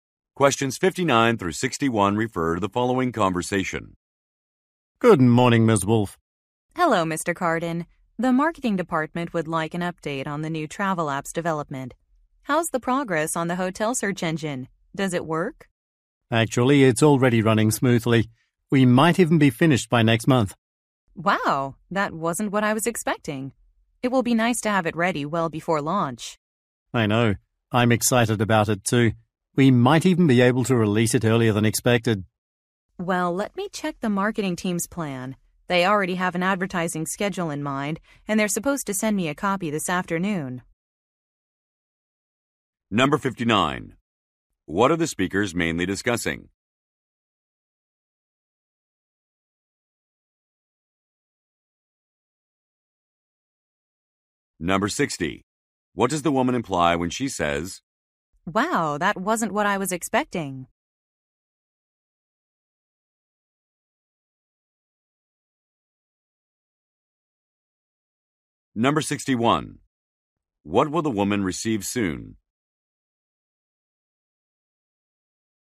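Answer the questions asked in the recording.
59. The development of a new travel app
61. A copy of the marketing team's advertising schedule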